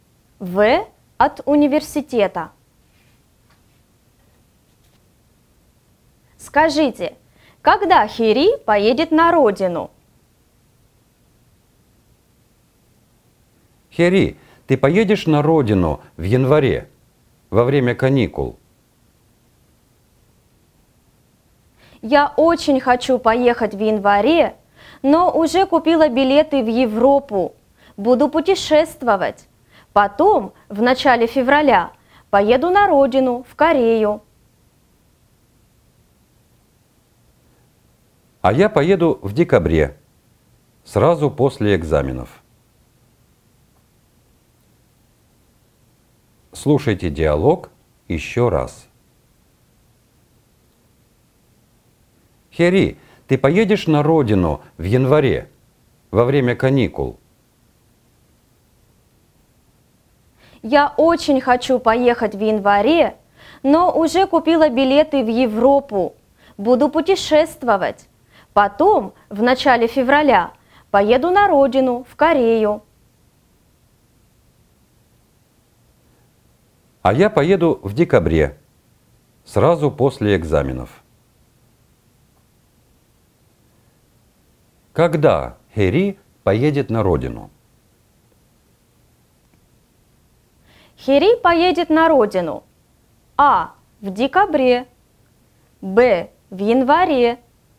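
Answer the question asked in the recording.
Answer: В: В феврале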